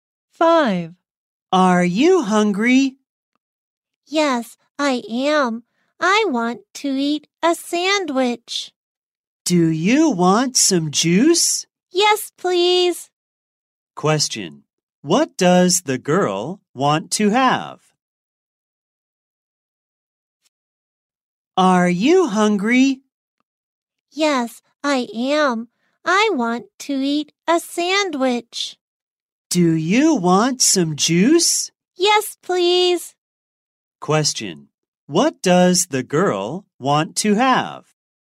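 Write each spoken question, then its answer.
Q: What does the girl want to have?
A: A sandwich and some juice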